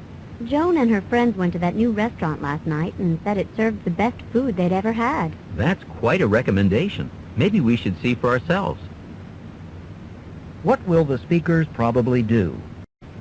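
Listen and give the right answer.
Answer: Try the new restaurant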